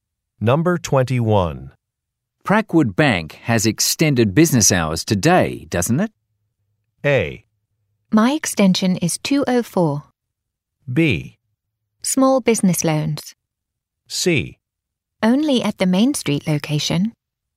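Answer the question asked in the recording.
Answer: C: Only at the Main Street location.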